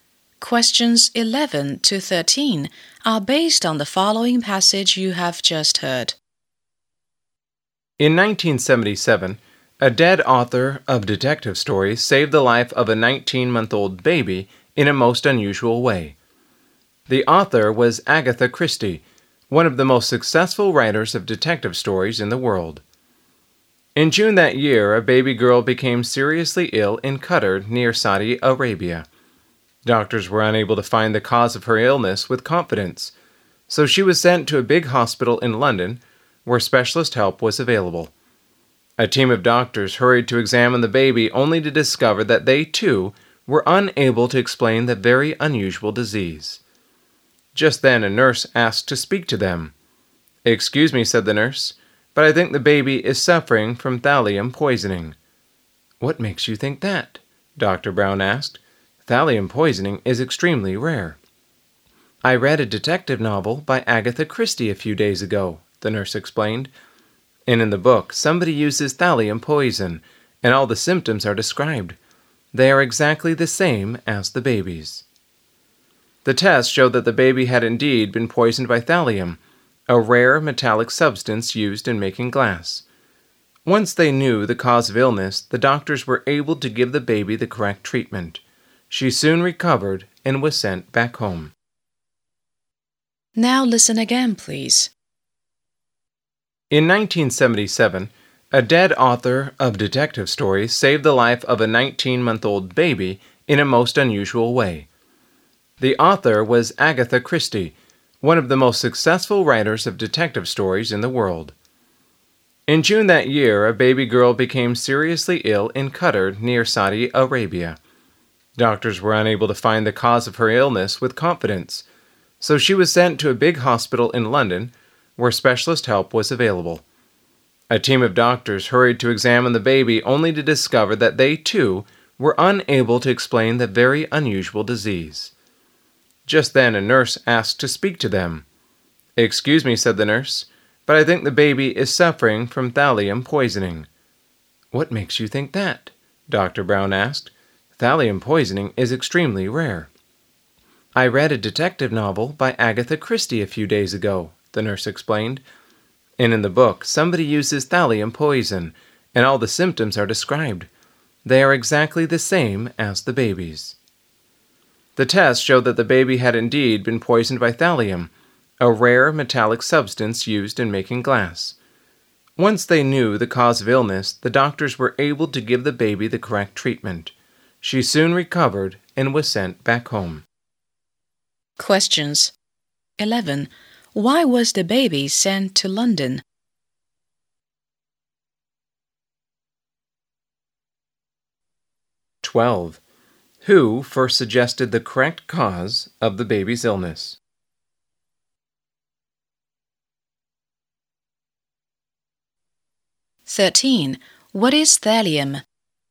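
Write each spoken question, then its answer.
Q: Why was the baby sent to London?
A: Doctors in Qatar couldn't find the cause of her illness, and specialist help was available in London

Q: Who first suggested the correct cause of the baby's illness?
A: A nurse

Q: What is thallium?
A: A rare metallic substance used in making glass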